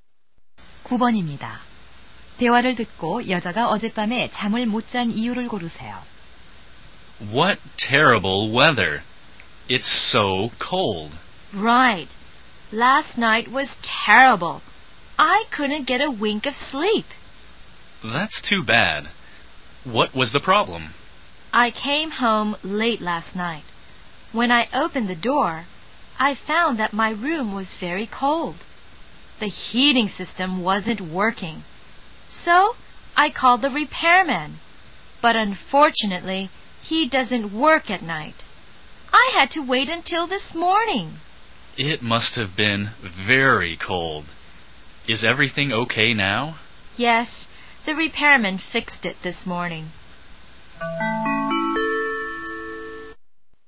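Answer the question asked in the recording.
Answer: 난방이 고장 나 방이 추워서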